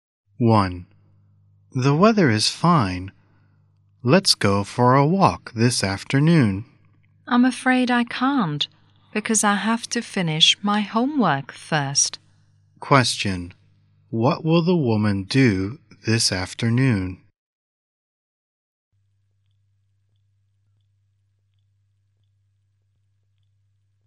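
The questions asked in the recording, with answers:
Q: What will the woman do this afternoon?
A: Finish her homework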